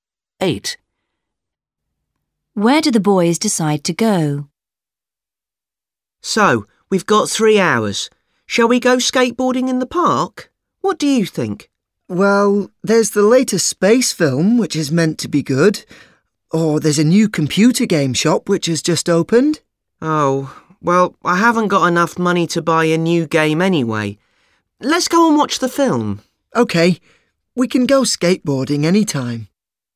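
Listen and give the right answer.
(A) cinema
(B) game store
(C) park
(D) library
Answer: (A) cinema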